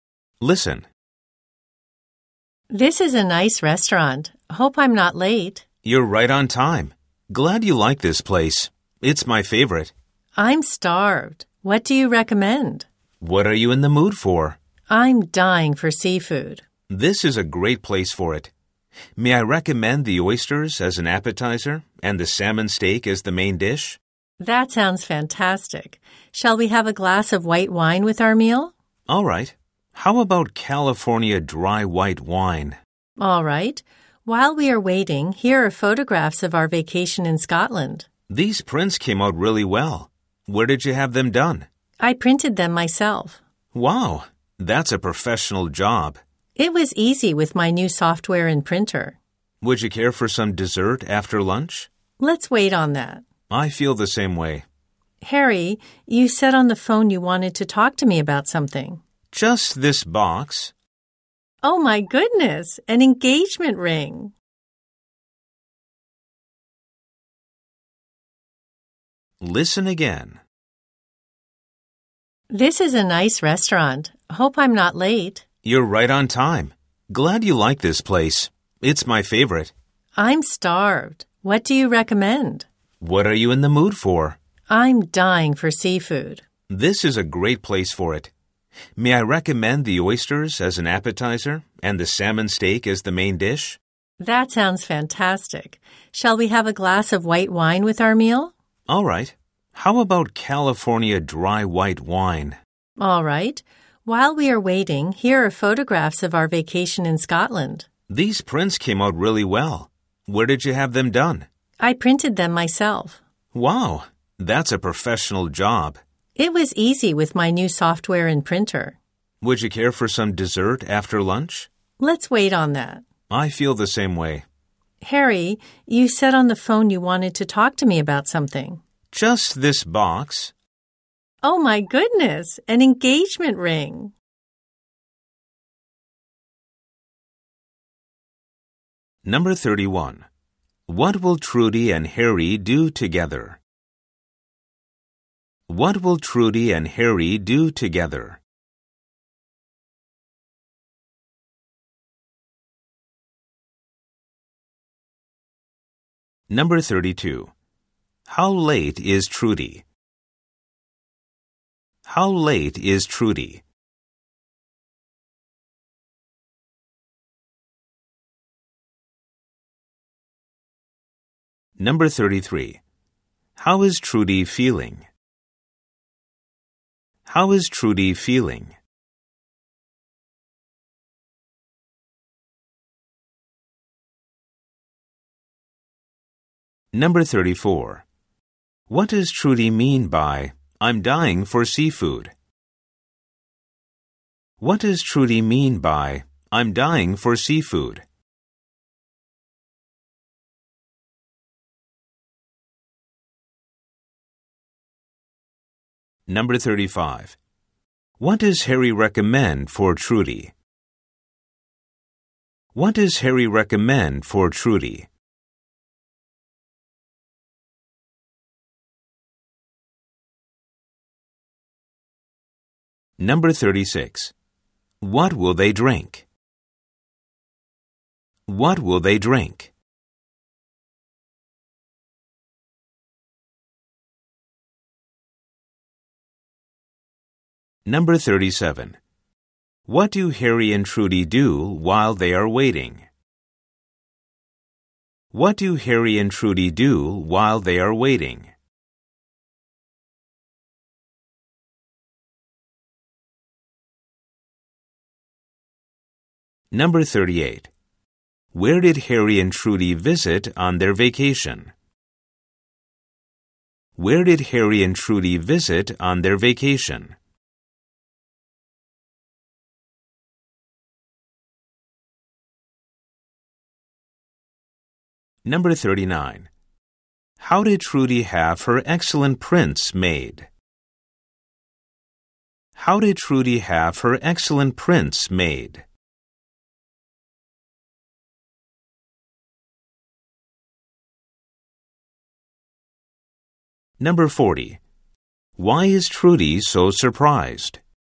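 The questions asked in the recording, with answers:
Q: What will Trudy and Harry do together?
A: Have lunch at a restaurant

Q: How late is Trudy?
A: She is not late; she is right on time

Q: How is Trudy feeling?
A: Very hungry

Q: What does Trudy mean by, "I'm dying for seafood"?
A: She really wants to eat seafood

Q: What does Harry recommend for Trudy?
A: Oysters as an appetizer and salmon steak as the main dish

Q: What will they drink?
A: California dry white wine

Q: What do Harry and Trudy do while they are waiting?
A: Look at photographs of their vacation

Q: Where did Harry and Trudy visit on their vacation?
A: Scotland

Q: How did Trudy have her excellent prints made?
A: She printed them herself with her new software and printer

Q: Why is Trudy so surprised?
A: Harry gives her an engagement ring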